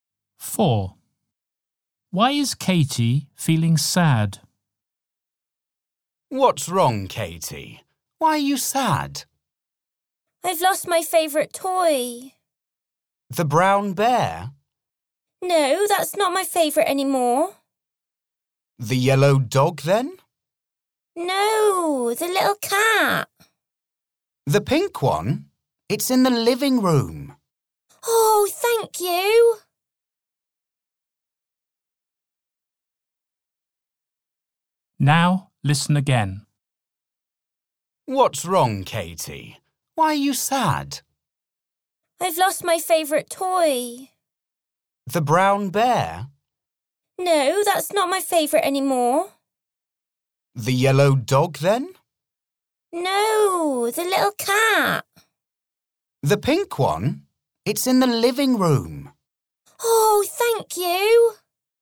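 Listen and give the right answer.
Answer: She has lost her favourite toy, the little pink cat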